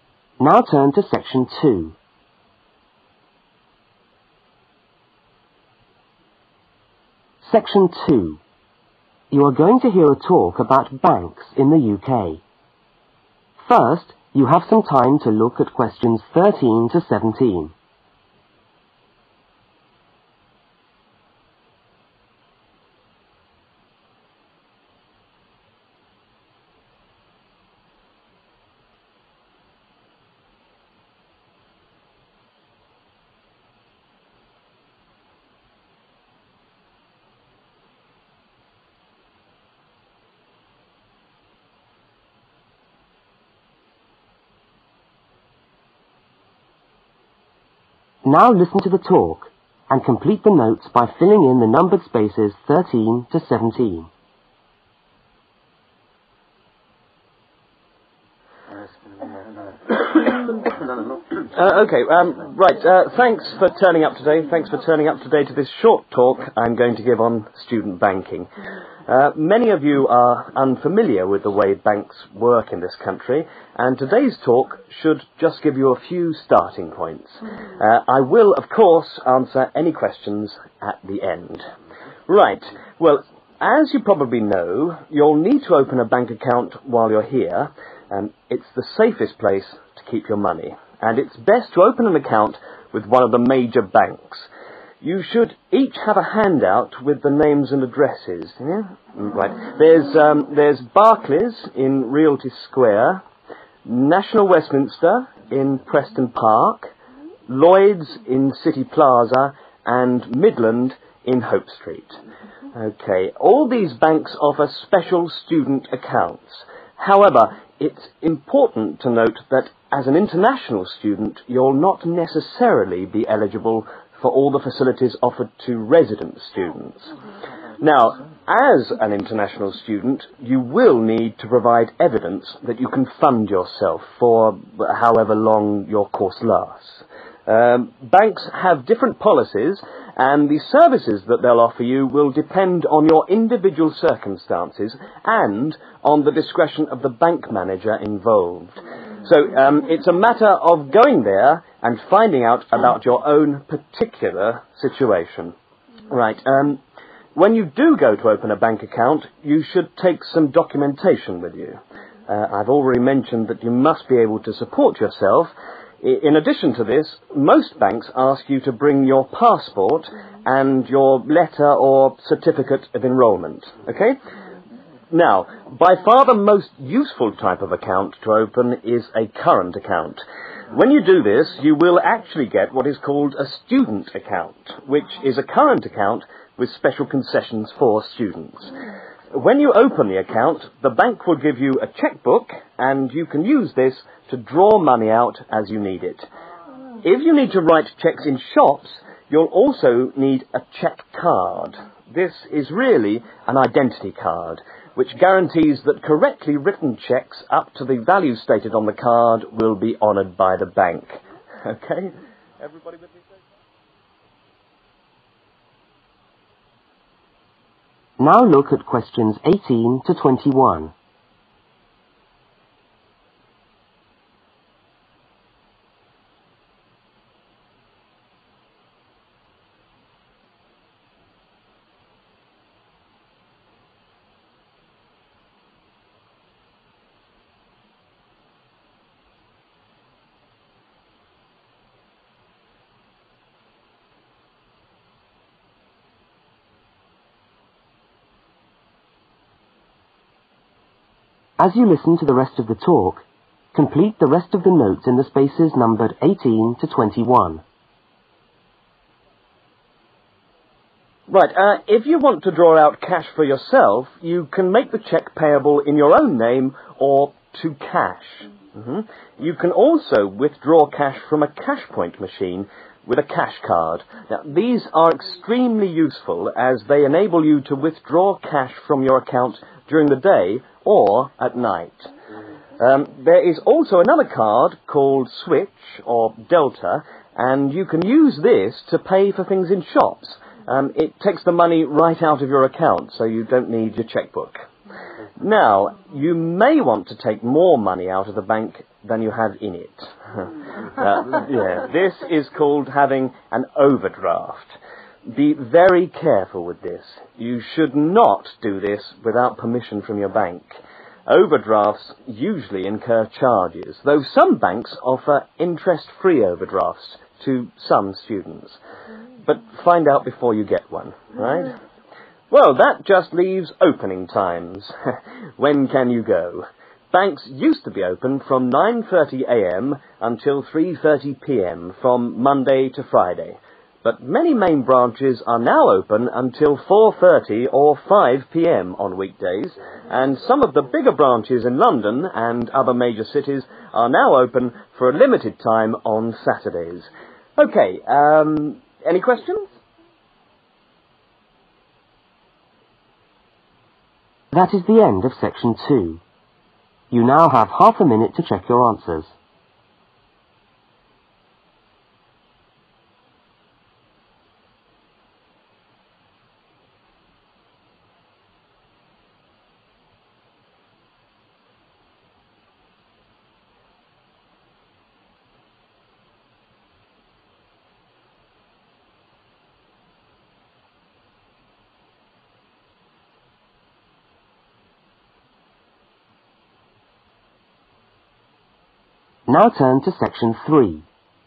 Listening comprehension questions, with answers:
Complete the notes. Write NO MORE THAN THREE WORDS for each answer.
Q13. Midland (13)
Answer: hope street

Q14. Must provide (14) I can support myself.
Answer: evidence

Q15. Take with me: (15) and letter of enrollment.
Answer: passport

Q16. Recommended account: (16)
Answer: current account

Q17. Bank supplies: (17) and chequecard which guarantees cheques.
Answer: chequebook

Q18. Cashcard: (you can (18) cash at any time.)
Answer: withdraw

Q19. Switch/Delta cards: (take the money (19) the account.)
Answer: directly from